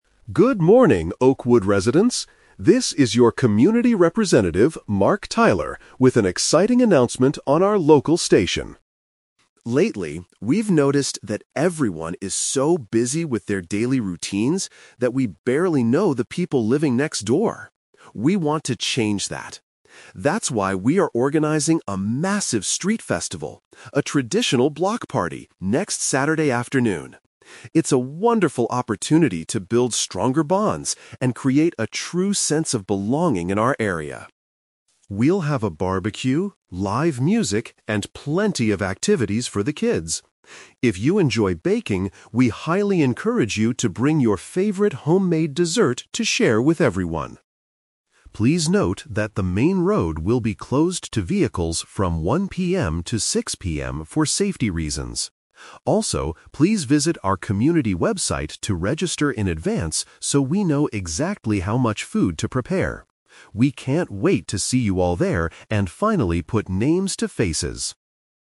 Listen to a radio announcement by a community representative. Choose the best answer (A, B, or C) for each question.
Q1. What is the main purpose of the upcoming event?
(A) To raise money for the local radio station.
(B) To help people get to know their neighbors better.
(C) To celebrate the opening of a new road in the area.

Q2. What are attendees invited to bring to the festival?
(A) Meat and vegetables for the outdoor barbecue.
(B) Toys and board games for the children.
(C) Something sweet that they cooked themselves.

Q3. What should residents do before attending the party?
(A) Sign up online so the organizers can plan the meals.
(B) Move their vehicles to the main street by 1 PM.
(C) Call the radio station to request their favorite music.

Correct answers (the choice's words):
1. To help people get to know their neighbors better.
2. Something sweet that they cooked themselves.
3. Sign up online so the organizers can plan the meals.

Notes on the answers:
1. The speaker says the event is an opportunity to "build stronger bonds" because people currently "barely know the people living next door." He also mentions wanting to "put names to faces." All of this means getting to know neighbors better.
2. The speaker encourages people who enjoy baking to bring their "favorite homemade dessert." Paraphrasing: homemade = cooked themselves; dessert = something sweet.
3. The speaker asks residents to "visit our community website to register in advance so we know exactly how much food to prepare." Paraphrasing: visit website to register = sign up online; know how much food to prepare = plan the meals.

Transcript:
Mark Tyler: Good morning, Oakwood residents! This is your community representative, Mark Tyler, with an exciting announcement on our local station.
Lately, we've noticed that everyone is so busy with their daily routines that we barely know the people living next door. We want to change that! That's why we are organizing a massive street festival—a traditional block party—next Saturday afternoon. It's a wonderful opportunity to build stronger bonds and create a true sense of belonging in our area.
We'll have a barbecue, live music, and plenty of activities for the kids. If you enjoy baking, we highly encourage you to bring your favorite homemade dessert to share with everyone.
Please note that the main road will be closed to vehicles from 1 PM to 6 PM for safety reasons. Also, please visit our community website to register in advance so we know exactly how much food to prepare. We can't wait to see you all there and finally put names to faces!